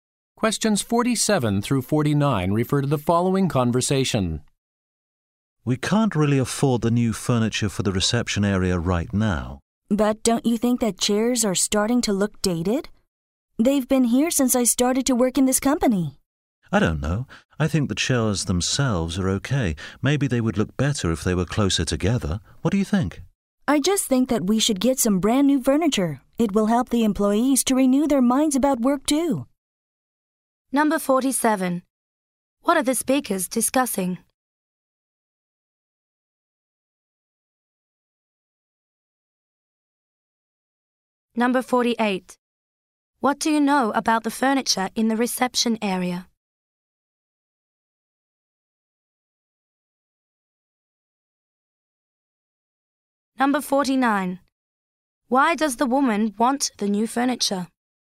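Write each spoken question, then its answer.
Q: What are the speakers discussing?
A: New furniture for the reception area

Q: What do you know about the furniture in the reception area?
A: It is old and looks dated

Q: Why does the woman want the new furniture?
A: To help employees renew their minds about work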